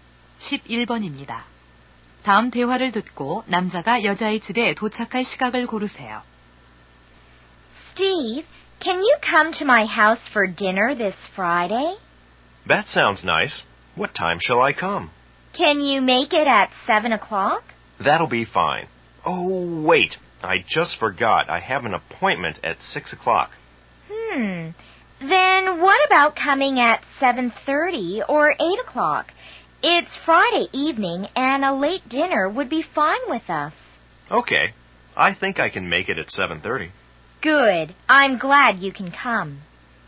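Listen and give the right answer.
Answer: 7시 30분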